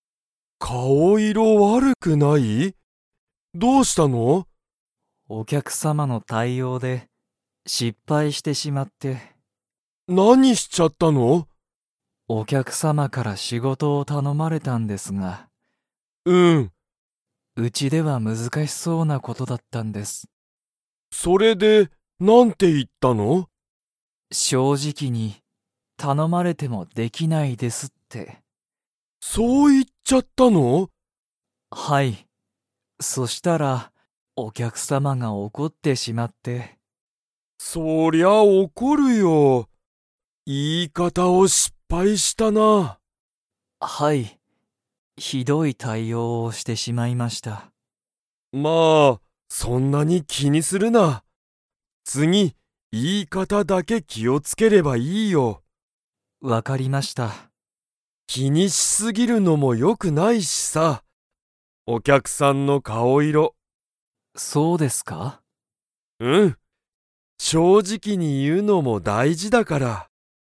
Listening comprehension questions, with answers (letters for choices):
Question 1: 鈴木すずきさんは、お客きゃくさんの対応たいおうで失敗しっぱいしましたか?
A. はい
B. いいえ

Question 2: 鈴木すずきさんの対応たいおうで、お客きゃくさんは 。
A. 笑わらった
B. 泣ないた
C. 怒おこった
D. 驚おどろいた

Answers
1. A
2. C

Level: Level 4